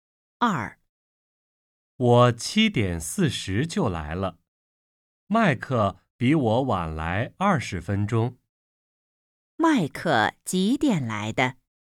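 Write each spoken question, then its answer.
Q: 麦克几点来的?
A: 8点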